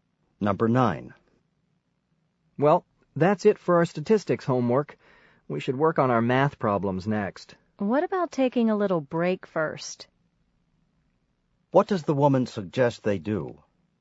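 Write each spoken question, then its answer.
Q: What does the woman suggest they do?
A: Take a short break first.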